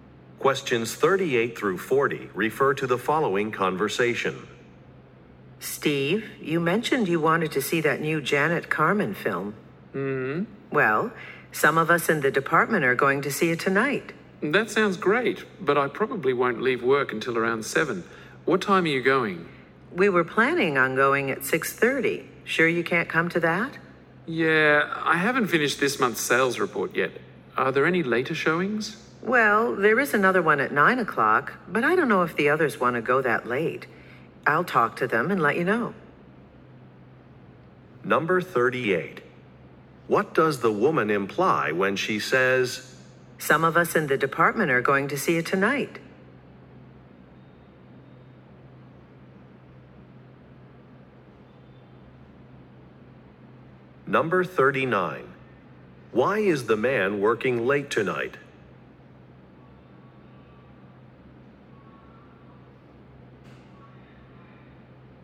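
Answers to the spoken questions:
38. She is inviting the man to join them
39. He hasn't finished this month's sales report
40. Talk to the others about going to the later 9 o'clock showing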